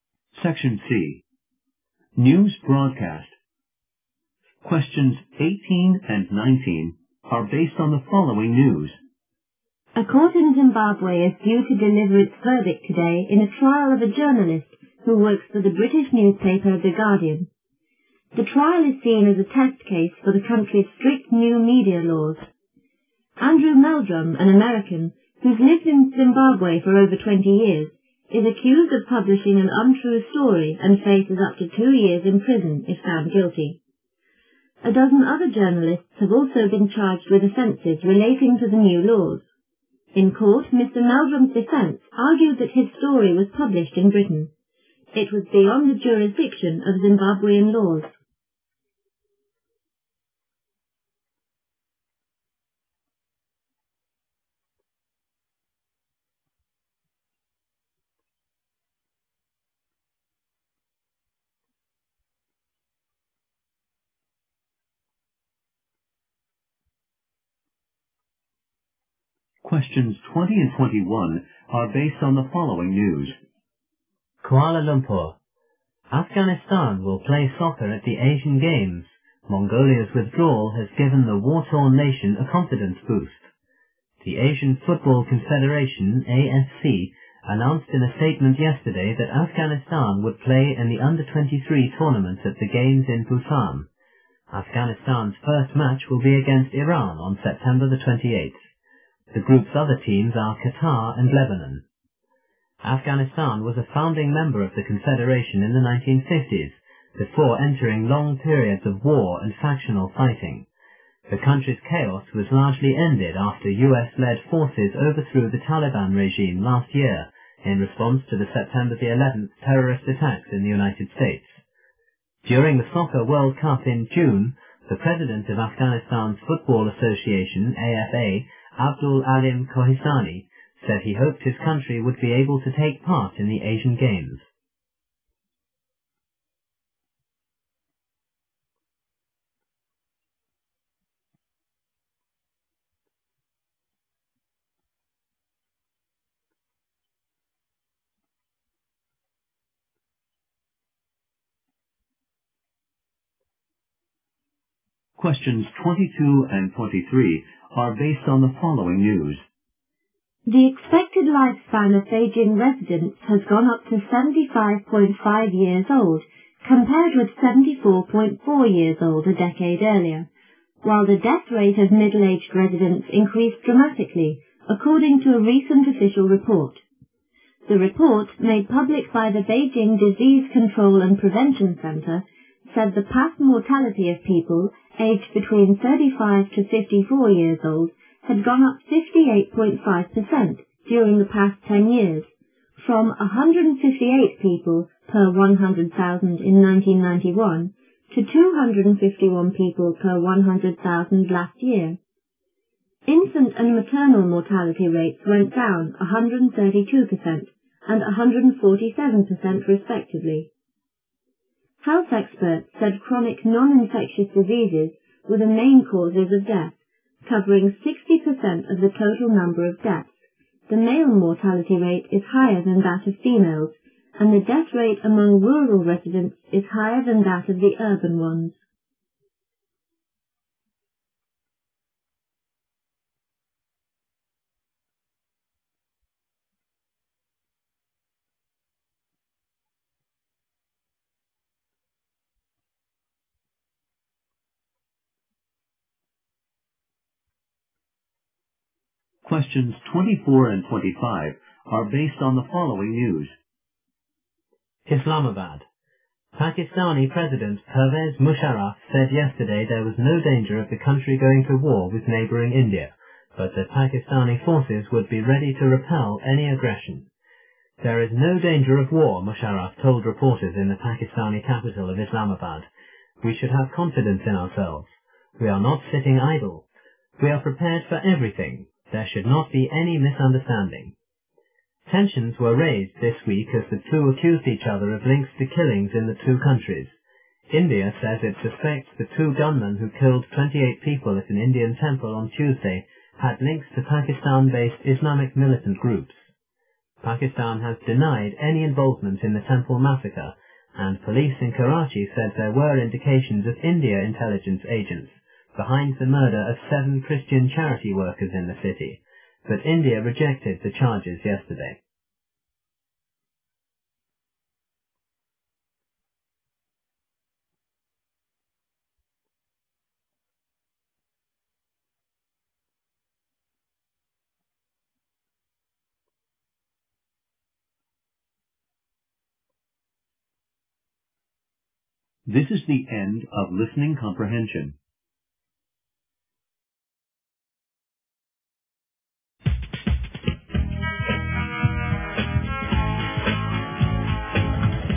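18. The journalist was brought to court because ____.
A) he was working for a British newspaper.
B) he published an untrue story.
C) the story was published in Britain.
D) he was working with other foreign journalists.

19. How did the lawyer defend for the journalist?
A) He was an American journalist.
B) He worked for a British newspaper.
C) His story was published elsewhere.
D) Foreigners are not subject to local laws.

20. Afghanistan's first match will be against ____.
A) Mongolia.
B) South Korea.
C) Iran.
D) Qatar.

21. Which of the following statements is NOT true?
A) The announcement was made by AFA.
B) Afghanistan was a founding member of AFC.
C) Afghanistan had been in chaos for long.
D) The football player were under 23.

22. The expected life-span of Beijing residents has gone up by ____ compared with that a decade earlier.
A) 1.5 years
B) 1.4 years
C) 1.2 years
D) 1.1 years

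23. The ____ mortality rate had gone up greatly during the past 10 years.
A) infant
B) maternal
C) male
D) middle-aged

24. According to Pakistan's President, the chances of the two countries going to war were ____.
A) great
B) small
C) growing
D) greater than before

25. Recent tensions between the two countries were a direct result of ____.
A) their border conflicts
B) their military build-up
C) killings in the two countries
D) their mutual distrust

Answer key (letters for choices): 18B, 19C, 20C, 21A, 22D, 23D, 24B, 25C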